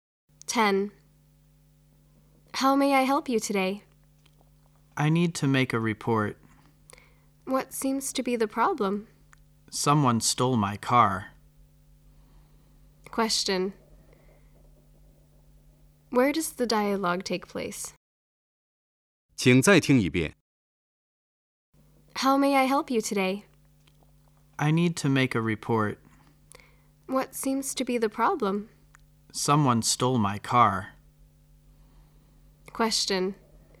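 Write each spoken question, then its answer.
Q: Where does the dialogue take place?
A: At a police station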